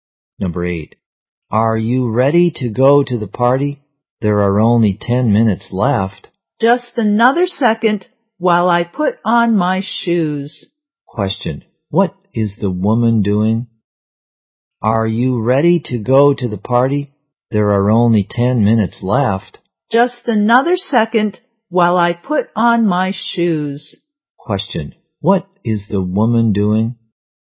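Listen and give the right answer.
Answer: Putting on her shoes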